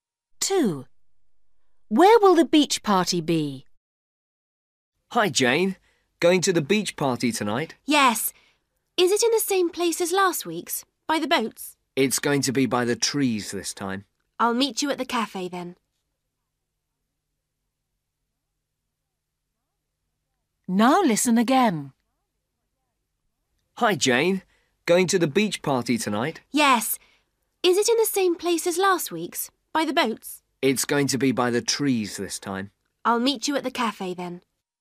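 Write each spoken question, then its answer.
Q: Where will the beach party be?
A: By the trees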